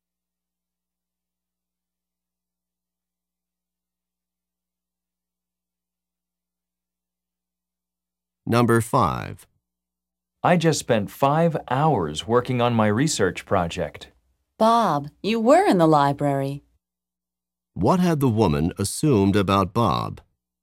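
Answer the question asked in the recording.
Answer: Bob was not in the library.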